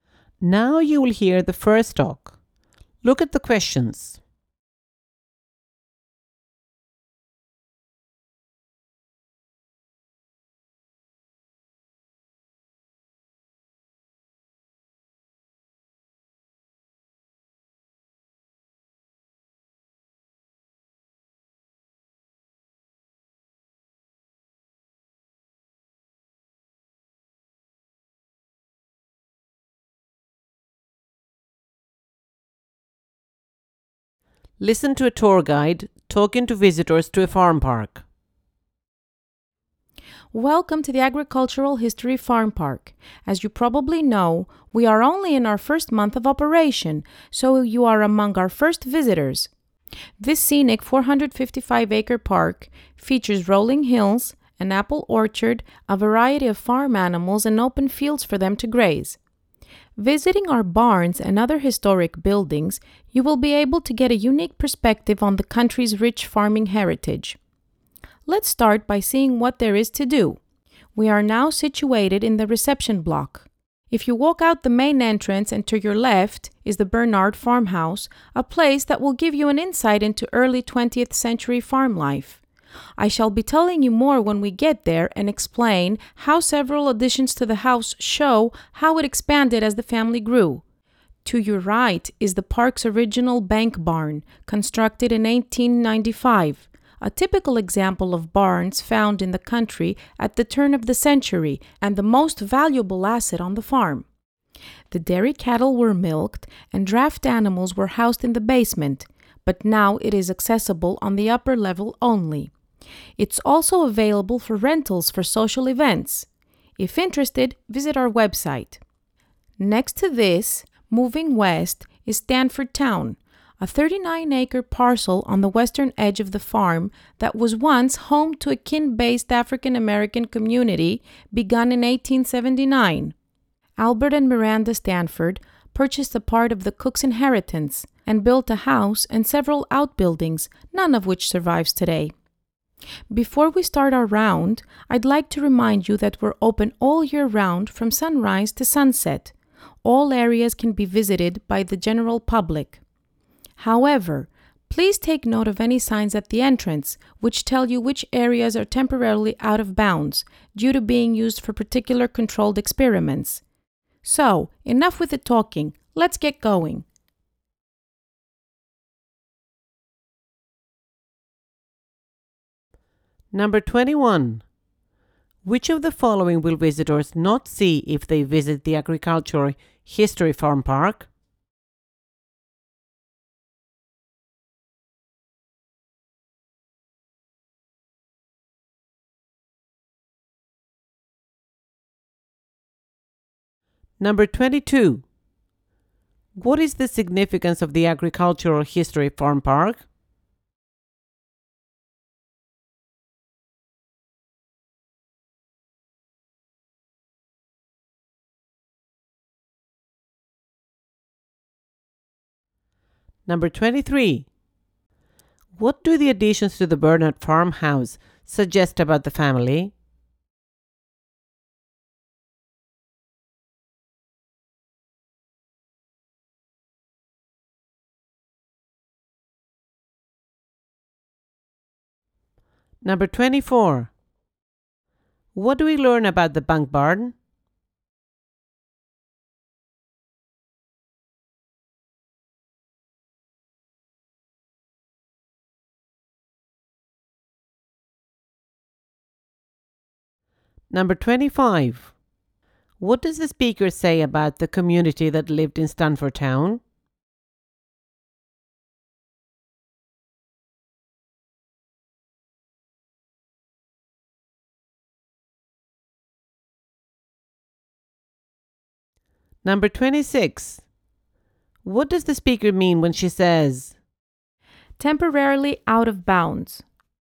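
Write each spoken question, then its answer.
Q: What is the significance of the Agricultural History Farm Park?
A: It gives a unique perspective on the country's rich farming heritage

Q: What do the additions to the Bernard Farmhouse suggest about the family?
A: The family grew

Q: What does the speaker mean when she says,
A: Some areas are temporarily closed to visitors because they are used for experiments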